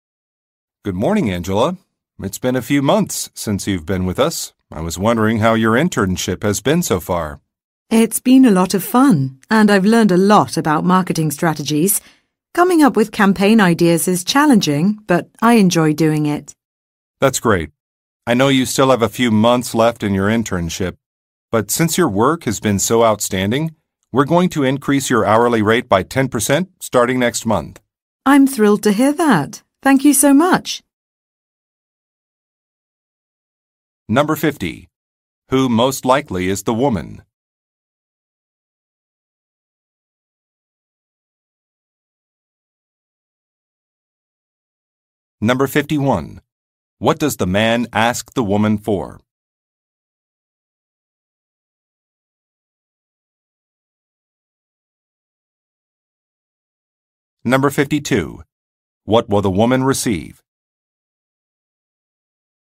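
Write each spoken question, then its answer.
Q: Who most likely is the woman?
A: A marketing intern

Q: What does the man ask the woman for?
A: Feedback on how her internship has been going

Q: What will the woman receive?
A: A 10% raise in her hourly pay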